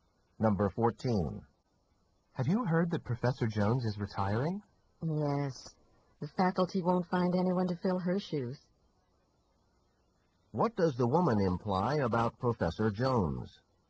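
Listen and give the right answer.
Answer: She will be hard to replace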